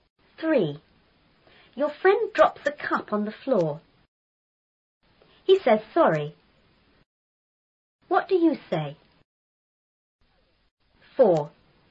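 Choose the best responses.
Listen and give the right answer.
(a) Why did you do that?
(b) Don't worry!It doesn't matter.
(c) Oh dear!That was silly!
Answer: (b) Don't worry!It doesn't matter.

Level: 初中英语广州版4B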